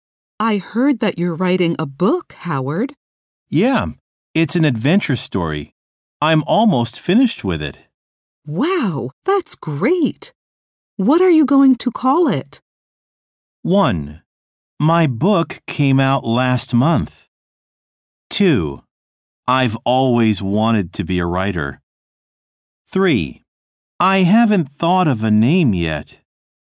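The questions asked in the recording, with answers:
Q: Wow, that's great. What are you going to call it?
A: 3: I haven't thought of a name yet.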